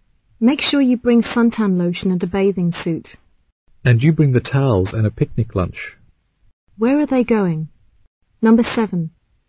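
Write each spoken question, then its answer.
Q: Where are they going?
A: To the beach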